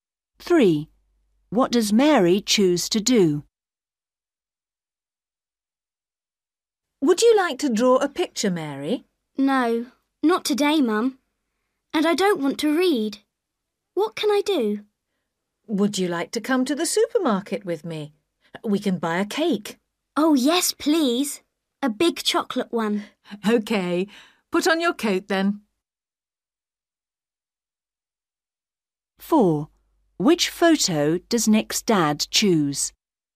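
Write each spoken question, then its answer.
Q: What does Mary choose to do?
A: Go to the supermarket with her mum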